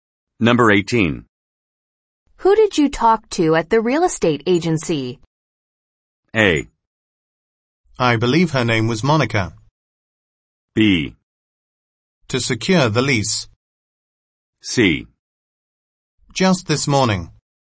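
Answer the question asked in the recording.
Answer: A: I believe her name was Monica.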